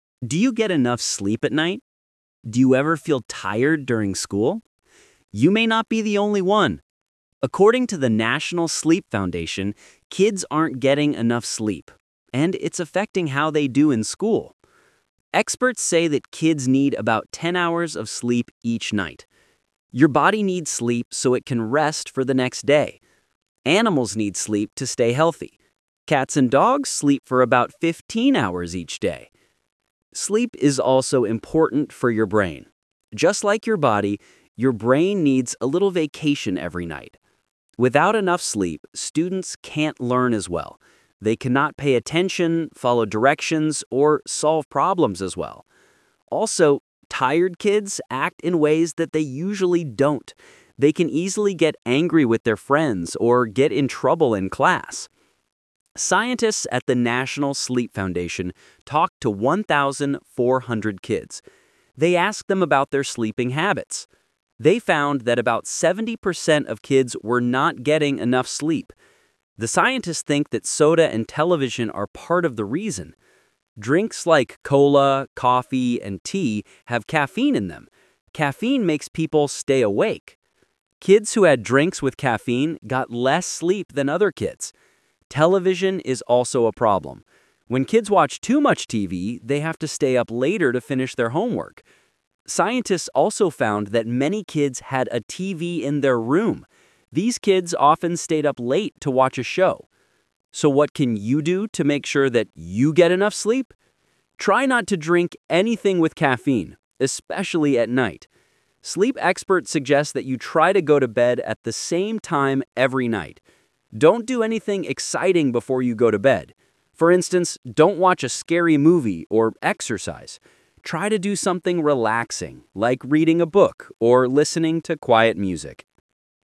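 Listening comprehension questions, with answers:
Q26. How many hours of sleep do experts suggest for kids?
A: Ten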